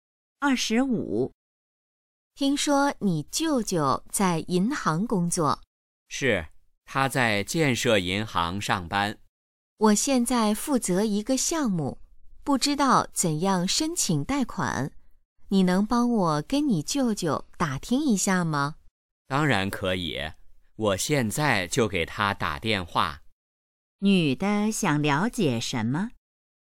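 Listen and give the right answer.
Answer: 怎样申请贷款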